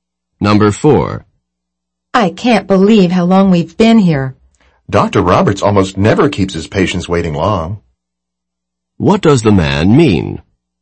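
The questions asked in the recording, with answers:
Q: What does the man mean?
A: Such a long wait is unusual for Dr. Roberts.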